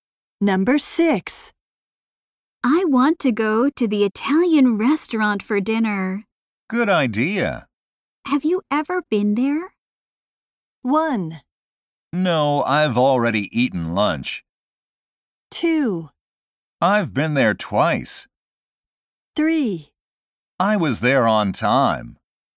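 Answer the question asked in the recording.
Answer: 2: I've been there twice.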